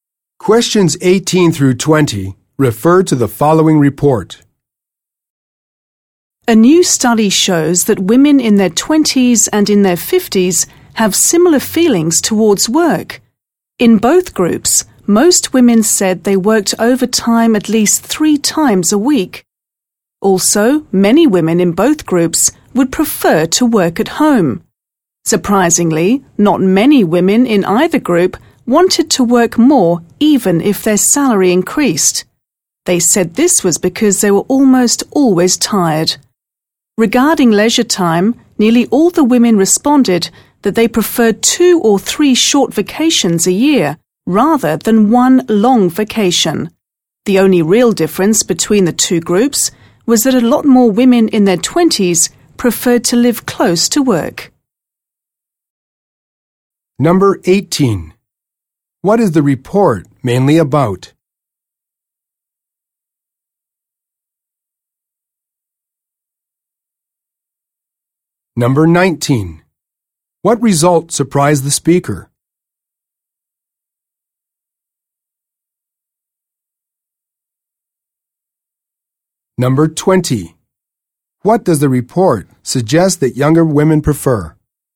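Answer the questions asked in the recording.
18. How women in their 20s and 50s feel about work
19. Few women wanted to work more even if their pay went up
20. Living close to work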